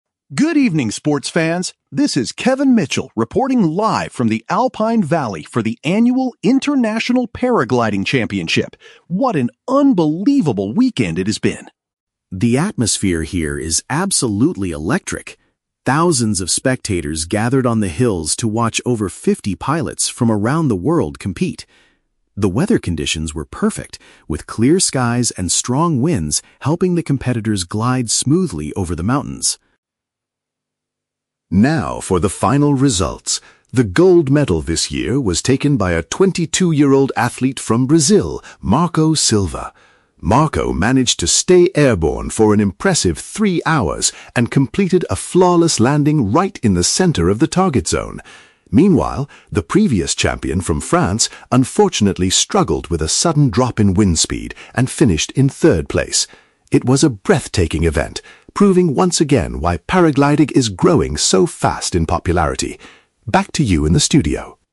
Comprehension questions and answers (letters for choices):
Listen to the sports news report about a paragliding competition. Choose the correct answer (A, B, or C) for each question.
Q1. How does the reporter describe the environment at the event?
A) It was very quiet because only a few people came to watch.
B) It was full of energy with a massive crowd of people watching.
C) It was delayed because of heavy rain and dangerous storms.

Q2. How did Marco Silva secure the first prize?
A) He flew the fastest across the entire mountain range.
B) He performed a dangerous trick that no one else tried.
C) He remained in the sky for a long time and touched down perfectly.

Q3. What problem did the former champion face during the competition?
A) He experienced an unexpected change in the weather conditions.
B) He crashed into a tall tree and severely broke his equipment.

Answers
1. B
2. C
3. A

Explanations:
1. The reporter says the atmosphere is "absolutely electric" and "thousands of spectators gathered." "Full of energy" is a paraphrase for electric, and "massive crowd" means thousands of spectators. Why the traps are wrong: Option A is the exact opposite of the truth. Option C is a trap; the weather was actually "perfect, with clear skies."
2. The reporter states that Marco managed to "stay airborne for an impressive three hours" and completed a "flawless landing." Option C perfectly paraphrases this: "remained in the sky" (stay airborne) and "touched down perfectly" (flawless landing). Why the traps are wrong: Option A is a plausible sports metric, but pure speed was not mentioned as the reason he won. Option B is a trap; extreme sports often involve tricks, but Marco won through duration and accuracy, not dangerous tricks.
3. The reporter mentions that the previous champion "struggled with a sudden drop in wind speed." A drop in wind speed is an "unexpected change in the weather conditions." Why the traps are wrong: Option B is a trap because extreme sports have crash risks, but nobody crashed in the audio. Option C is incorrect; the former champion "finished in third place," meaning he was not disqualified.

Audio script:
Reporter: Good evening, sports fans! This is Kevin Mitchell reporting live from the Alpine Valley for the annual International Paragliding Championship. What an unbelievable weekend it has been!
The atmosphere here is absolutely electric. Thousands of spectators gathered on the hills to watch over fifty pilots from around the world compete. The weather conditions were perfect, with clear skies and strong winds helping the competitors glide smoothly over the mountains.
Now, for the final results. The gold medal this year was taken by a twenty-two-year-old athlete from Brazil, Marco Silva. Marco managed to stay airborne for an impressive three hours and completed a flawless landing right in the center of the target zone. Meanwhile, the previous champion from France unfortunately struggled with a sudden drop in wind speed and finished in third place. It was a breathtaking event, proving once again why paragliding is growing so fast in popularity. Back to you in the studio!